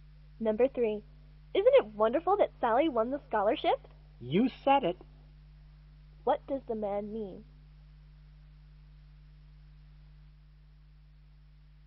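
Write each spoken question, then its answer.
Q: What does the man mean?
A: He agrees that it's wonderful.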